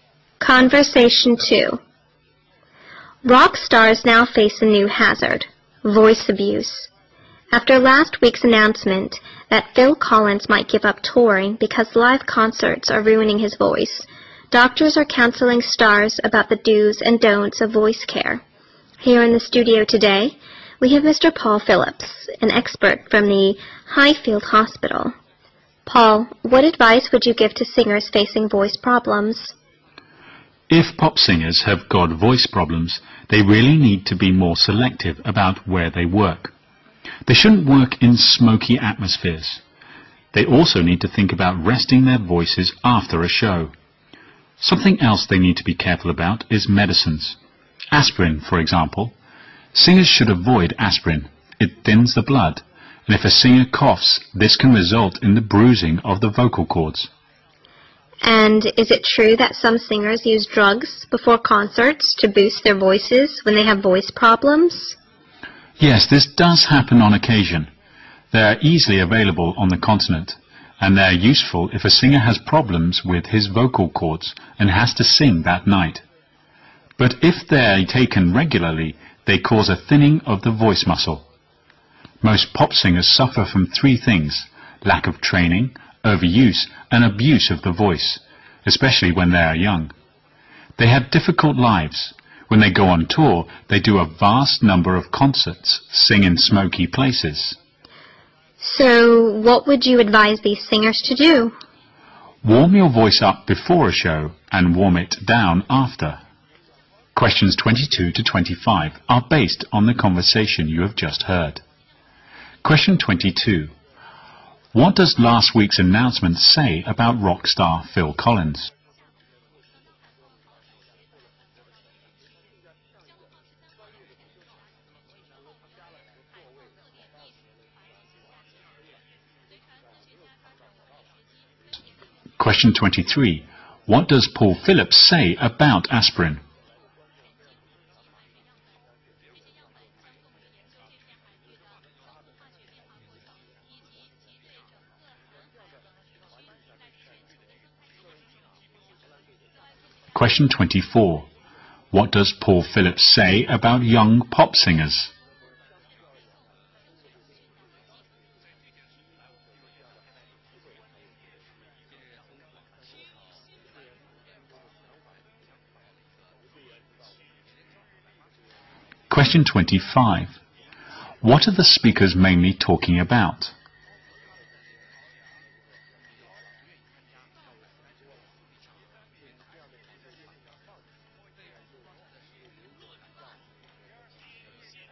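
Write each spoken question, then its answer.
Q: What does last week's announcement say about rock star Phil Collins?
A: He might give up touring because live concerts are ruining his voice

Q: What does Paul Phillips say about aspirin?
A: Singers should avoid it because it thins the blood

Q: What does Paul Phillips say about young pop singers?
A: They lack training and overuse and abuse their voices

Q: What are the speakers mainly talking about?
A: Voice care for rock and pop singers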